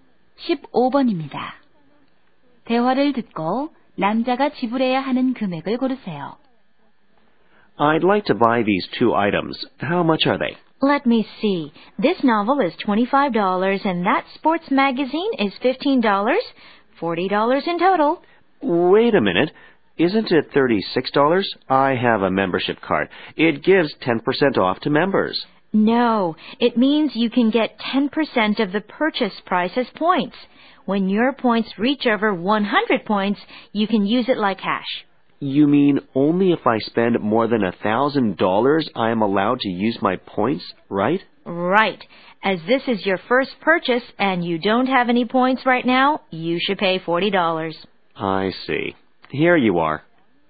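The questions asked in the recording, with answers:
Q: 대화를 듣고 남자가 지불해야 하는 금액을 고르세요.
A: $40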